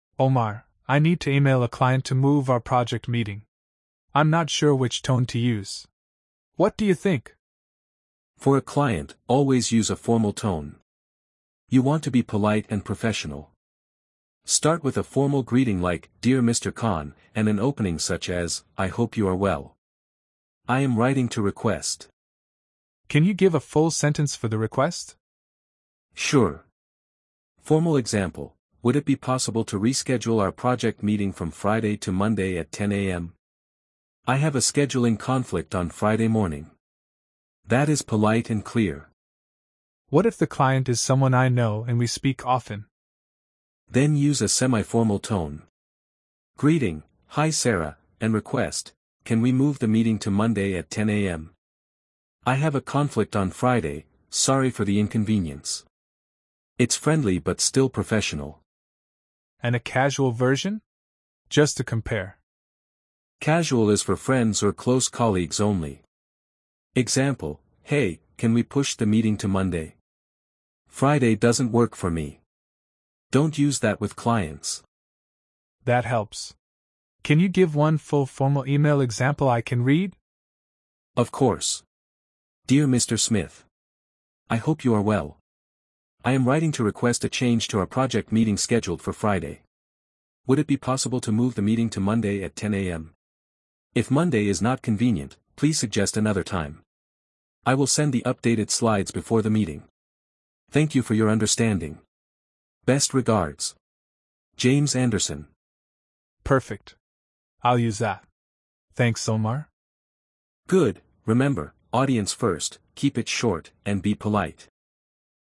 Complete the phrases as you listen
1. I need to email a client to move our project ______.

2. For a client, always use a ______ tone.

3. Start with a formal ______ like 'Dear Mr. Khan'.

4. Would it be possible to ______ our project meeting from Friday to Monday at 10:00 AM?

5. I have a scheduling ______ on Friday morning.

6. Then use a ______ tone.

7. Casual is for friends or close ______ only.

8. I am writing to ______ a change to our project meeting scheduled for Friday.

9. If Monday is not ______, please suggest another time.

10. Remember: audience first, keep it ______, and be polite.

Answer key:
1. meeting
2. formal
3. greeting
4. reschedule
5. conflict
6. semi-formal
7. colleagues
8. request
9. convenient
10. short

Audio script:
Ahmed: Omar, I need to email a client to move our project meeting. I'm not sure which tone to use. What do you think?
Omar: For a client, always use a formal tone. You want to be polite and professional. Start with a formal greeting like "Dear Mr. Khan," and an opening such as "I hope you are well. I am writing to request..."
Ahmed: Can you give a full sentence for the request?
Omar: Sure. Formal example: "Would it be possible to reschedule our project meeting from Friday to Monday at 10:00 AM? I have a scheduling conflict on Friday morning." That is polite and clear.
Ahmed: What if the client is someone I know and we speak often?
Omar: Then use a semi-formal tone. Greeting: "Hi Sara," and request: "Can we move the meeting to Monday at 10 AM? I have a conflict on Friday, sorry for the inconvenience." It's friendly but still professional.
Ahmed: And a casual version? Just to compare.
Omar: Casual is for friends or close colleagues only. Example: "Hey, can we push the meeting to Monday? Friday doesn't work for me." Don't use that with clients.
Ahmed: That helps. Can you give one full formal email example I can read?
Omar: Of course:
Dear Mr. Khan,
I am writing to request a change to our project meeting scheduled for Friday. If Monday is not convenient, please suggest another time. I will send the updated slides before the meeting.
Thank you for your understanding.
Best regards,
Ahmed: Perfect. I'll use that. Thanks, Omar.
Omar: Good, remember: audience first, keep it short, and be polite.
"Remember: audience first, keep it short, and be polite."